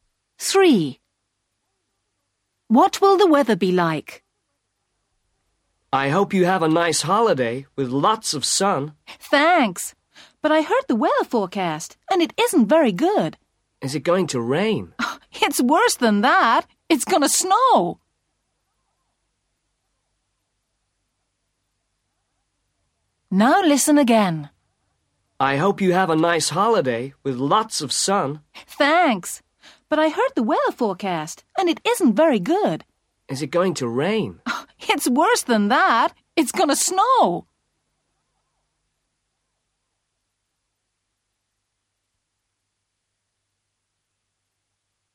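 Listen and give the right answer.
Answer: Snowy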